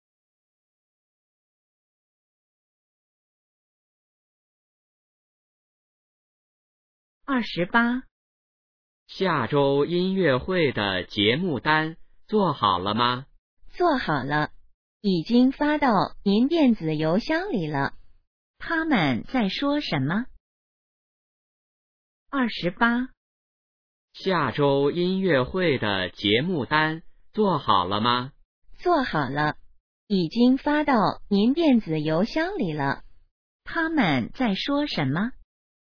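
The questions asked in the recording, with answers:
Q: 他们在说什么?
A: 音乐会的节目单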